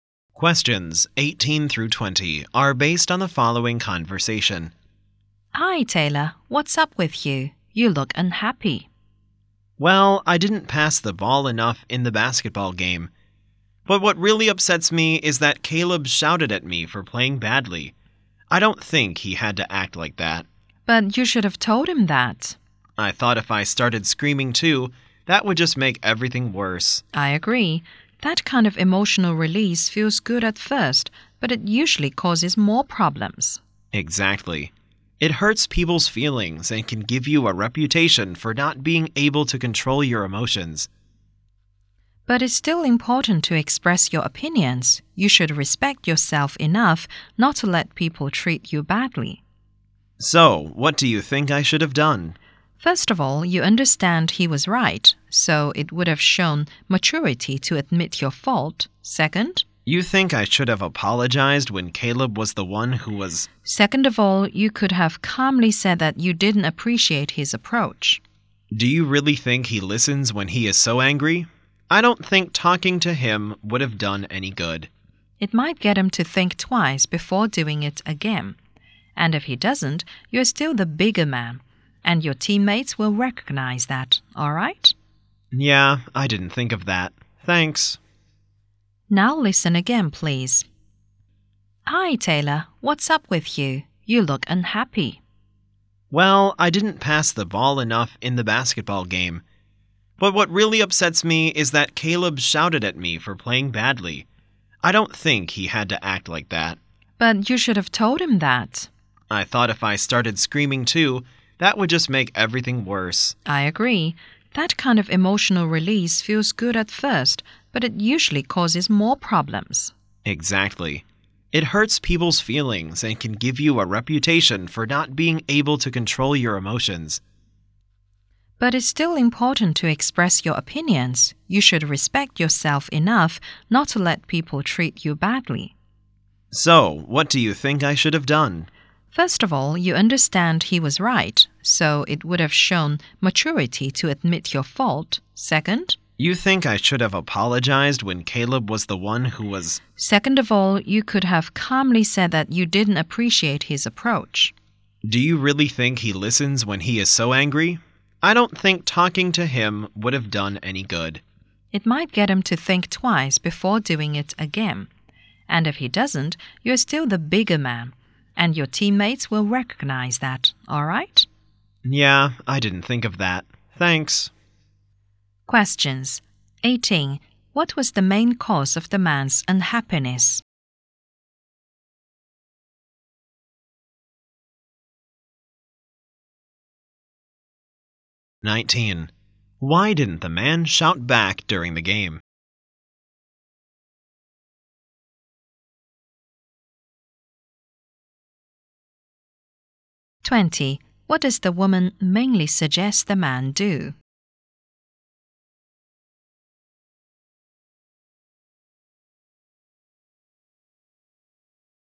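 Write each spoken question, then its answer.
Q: What was the main cause of the man's unhappiness?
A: Caleb shouted at him

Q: Why didn't the man shout back during the game?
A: He thought it would make everything worse

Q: What does the woman mainly suggest the man do?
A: Admit his fault and calmly tell Caleb he didn't appreciate his approach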